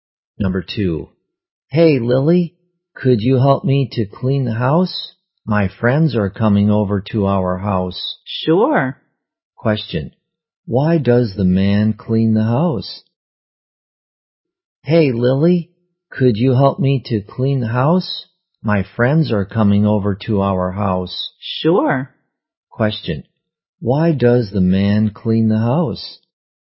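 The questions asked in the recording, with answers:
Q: Question, why does the man clean the house?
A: His friends are coming over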